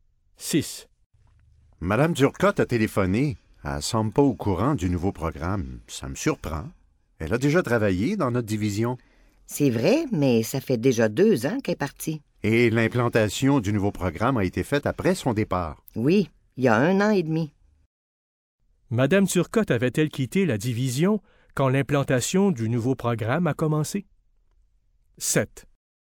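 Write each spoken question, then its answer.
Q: Madame Durcotte avait-elle quitté la division quand l'implantation du nouveau programme a commencé?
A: Oui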